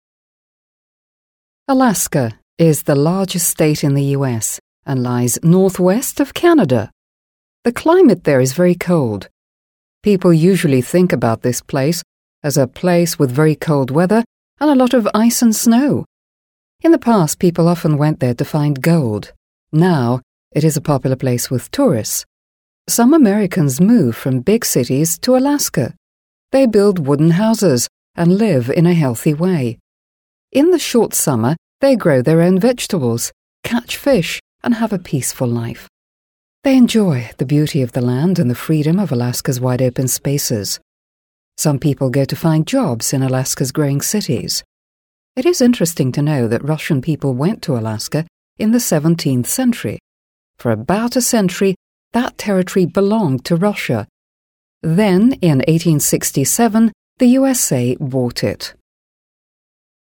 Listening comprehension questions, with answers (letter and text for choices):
Listen and complete the statements.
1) Alaska is ... .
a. larger than Canada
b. the biggest state of the USA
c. not so big as Canada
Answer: b. the biggest state of the USA

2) In the past ... .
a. Alaska had colder winters than now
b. the climate in Alaska was warmer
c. people came to Alaska because they wanted to become rich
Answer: c. people came to Alaska because they wanted to become rich

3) These days ... .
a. people from other parts of the USA come to live in Alaska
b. tourists are not interested in Alaska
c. all people in Alaska grow vegetables and catch fish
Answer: a. people from other parts of the USA come to live in Alaska

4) These days Alaska is ... .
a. a developing state of the USA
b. a free state of the USA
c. an empty territory of the USA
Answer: a. a developing state of the USA

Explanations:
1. В тексте сказано: «Alaska is the largest state in the U.S.» (Аляска — крупнейший штат в США). Для выбора правильного ответа мы используем синонимы. Прилагательное largest (крупнейший) по смыслу равнозначно biggest (самый большой). С грамматической точки зрения здесь используется превосходная степень прилагательного (Superlative Degree). Поскольку слово big — короткое, мы добавляем суффикс -est и удваиваем согласную g (big → the biggest). Артикль the обязателен перед превосходной степенью. Вариант a (larger than Canada) неверен, так как в тексте сказано, что она находится к северо-западу от Канады, но не сказано, что она больше самой Канады (Канада — вторая по площади страна в мире).
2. В тексте есть предложение: «In the past, people often went there to find gold» (В прошлом люди часто ездили туда, чтобы найти золото). Фраза «find gold» (найти золото) является ключевой подсказкой. Поиск золота напрямую связан с желанием разбогатеть (become rich). Грамматически предложение построено в Past Simple (простом прошедшем времени), так как речь идет о фактах в прошлом. Глагол come (приходить/приезжать) стоит во второй форме — came.
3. Основанием для этого ответа служит предложение из текста: «Some Americans move from big cities to Alaska» (Некоторые американцы переезжают из больших городов на Аляску). Фраза «move from big cities» (переезжают из больших городов) перефразирована в варианте ответа как «people from other parts of the USA come to live» (люди из других частей США приезжают жить). Вариант b неверен, так как в тексте сказано «popular place with tourists» (популярное место у туристов). Вариант c неверен из-за слова all (все), так как в тексте говорится лишь о некоторых людях («Some Americans»), которые ведут такой образ жизни.
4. Правильный ответ опирается на фразу: «Some people go to find jobs in Alaska's growing cities» (Некоторые люди едут искать работу в растущих городах Аляски). Слово growing (растущий) в контексте экономики и городов является синонимом слова developing (развивающийся). Люди едут туда ради работы, что подтверждает развитие региона. Вариант c (empty territory) не подходит, так как, несмотря на «wide-open spaces» (широкие открытые пространства), наличие растущих городов и приток людей противоречит понятию «пустая территория».

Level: 7 Класс